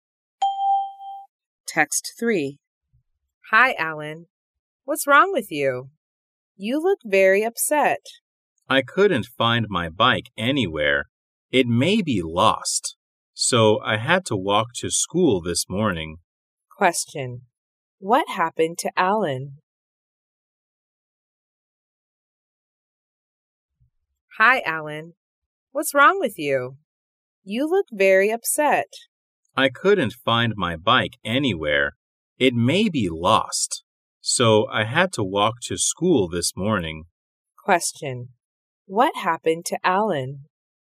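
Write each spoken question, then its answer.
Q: What happened to Alan?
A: His bike may be lost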